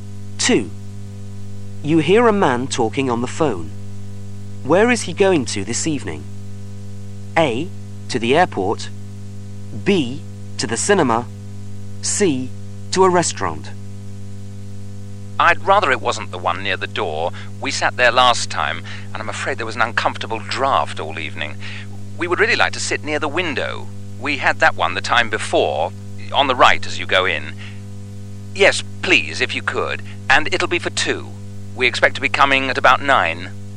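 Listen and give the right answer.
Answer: C: To a restaurant.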